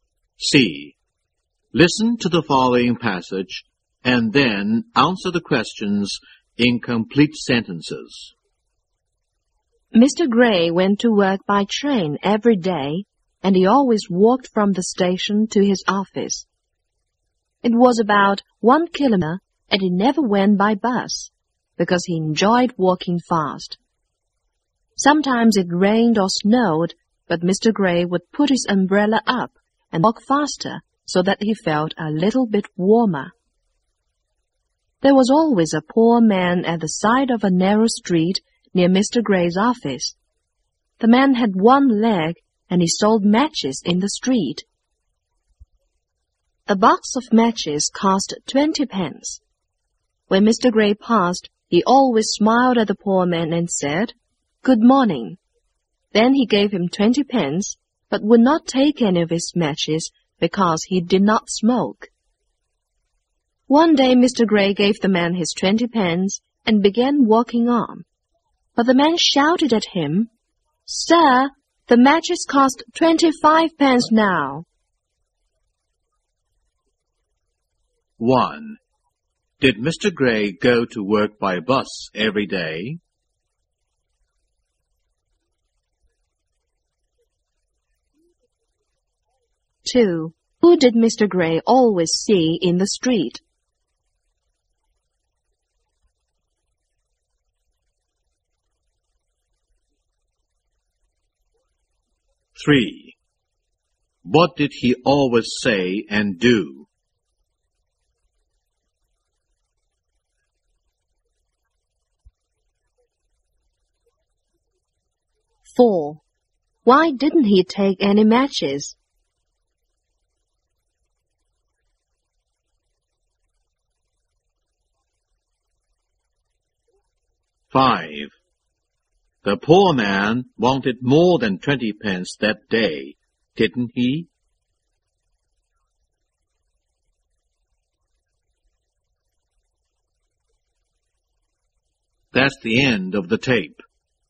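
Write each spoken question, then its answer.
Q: Did Mr. Gray go to work by bus every day?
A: No, he went to work by train and walked from the station.

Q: Who did Mr. Gray always see in the street?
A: A poor man with one leg who sold matches.

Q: What did he always say and do?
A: He smiled, said "Good morning" and gave him 20 pence.

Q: Why didn't he take any matches?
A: Because he did not smoke.

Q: The poor man wanted more than 20 pence that day, didn't he?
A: Yes, he wanted 25 pence.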